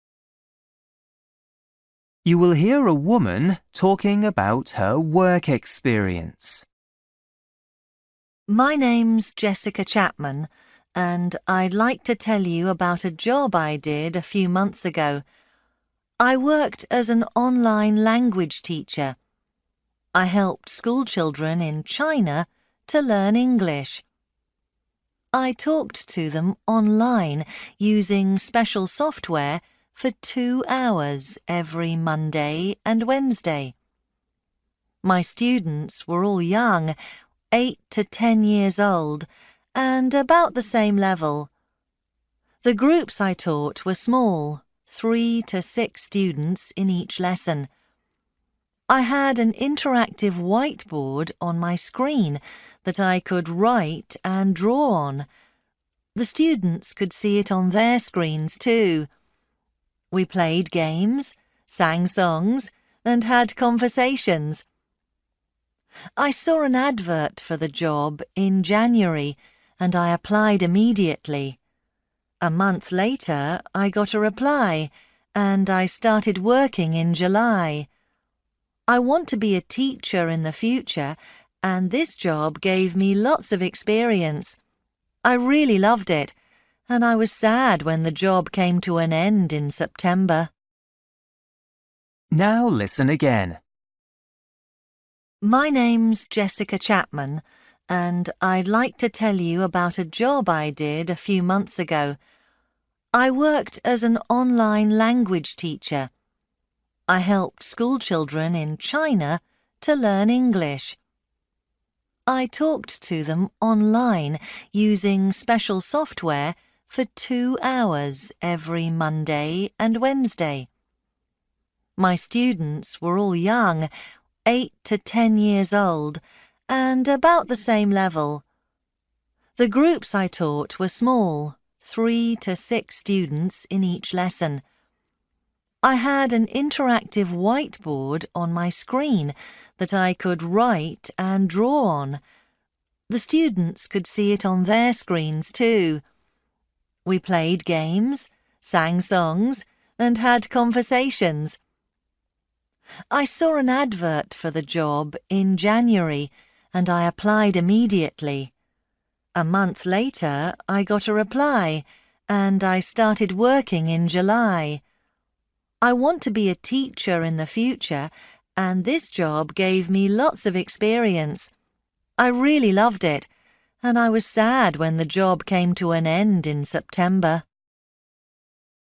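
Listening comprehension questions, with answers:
For each question, write the correct answer in the gap. Write one word or a number or a date or a time.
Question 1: Taught: Students in (1)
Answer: China

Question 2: Lessons: (2) hours a week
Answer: 4

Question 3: Number of students: three to (3)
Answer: 6

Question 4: In lessons: talked, played (4) and sang songs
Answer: games

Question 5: Worked: from (5) to September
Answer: July

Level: Luyện nghe trình độ A2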